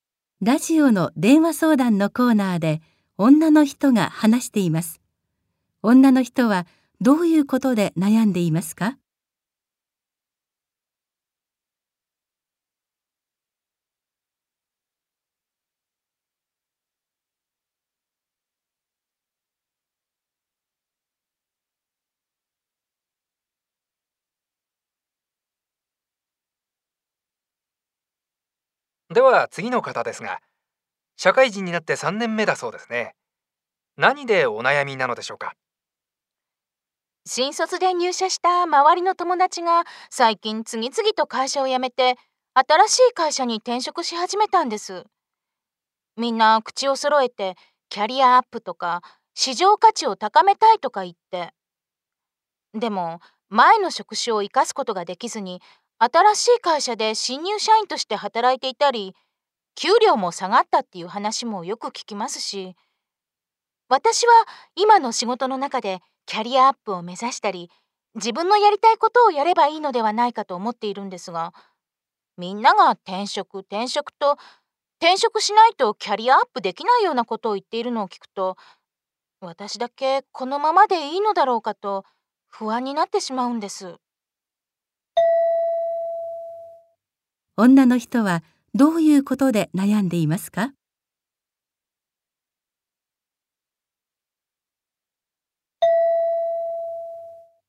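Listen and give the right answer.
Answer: 周りの友達が転職していく中で、自分だけ転職せずに今のままでいいのか不安になっていること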